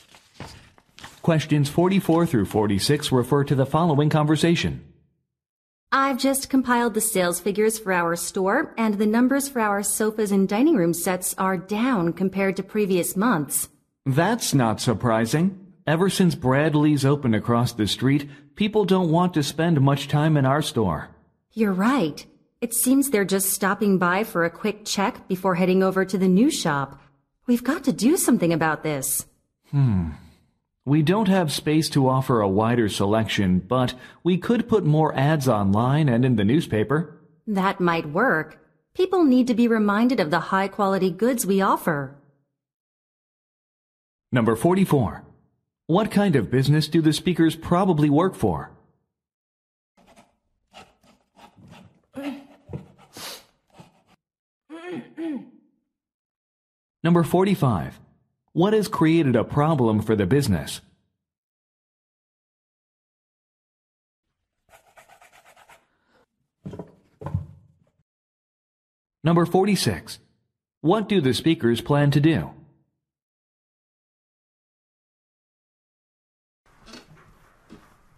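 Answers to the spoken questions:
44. A furniture store
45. A competitor opened across the street
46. Advertise more online and in newspapers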